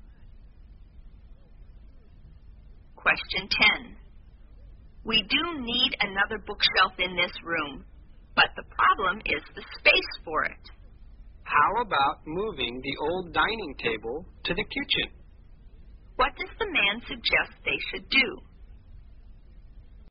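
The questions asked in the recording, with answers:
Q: What does the man suggest they should do?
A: Move the old dining table to the kitchen to make room for a bookshelf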